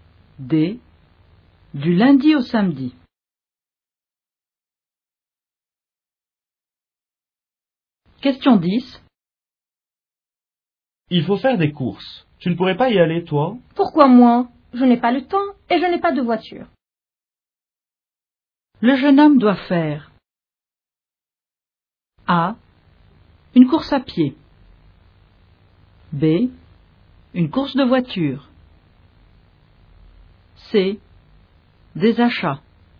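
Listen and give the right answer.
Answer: C: Des achats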